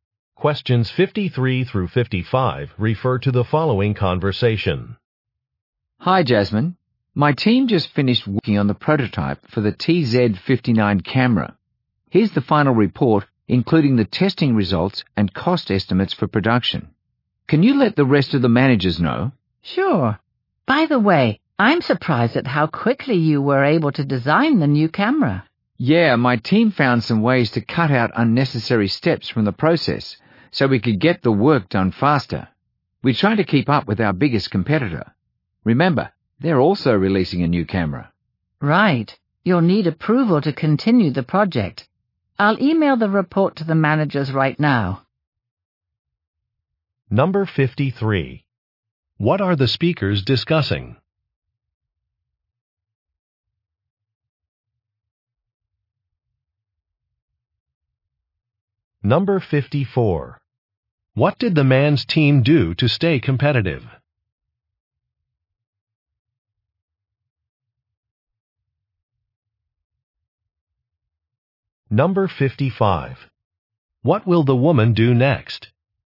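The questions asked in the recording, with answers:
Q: What are the speakers discussing?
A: A prototype for a new camera

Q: What did the man's team do to stay competitive?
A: They cut unnecessary steps from the process

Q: What will the woman do next?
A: Email the report to the managers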